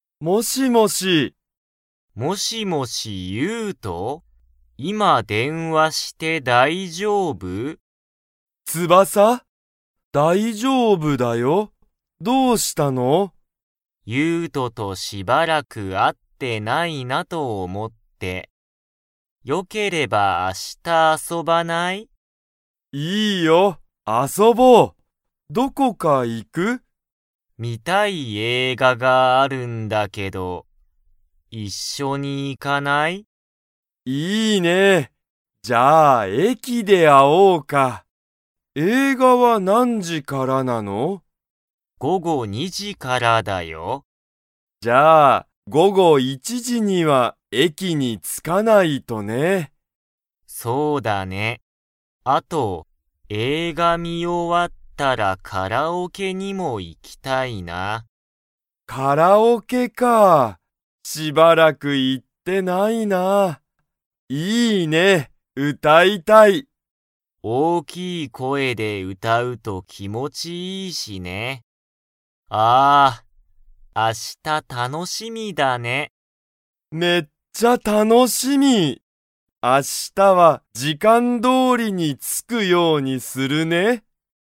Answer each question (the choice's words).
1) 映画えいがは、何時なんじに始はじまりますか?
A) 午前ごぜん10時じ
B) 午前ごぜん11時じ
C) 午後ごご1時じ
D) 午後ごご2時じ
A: 午後ごご2時じ

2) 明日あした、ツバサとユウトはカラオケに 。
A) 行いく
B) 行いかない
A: 行いく

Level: Level 3